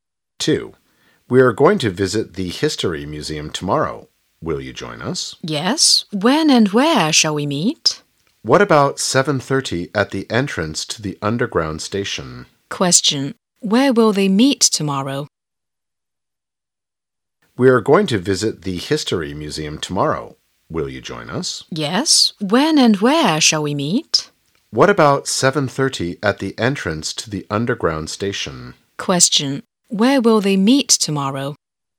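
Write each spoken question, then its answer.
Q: Where will they meet tomorrow?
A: At the entrance to the underground station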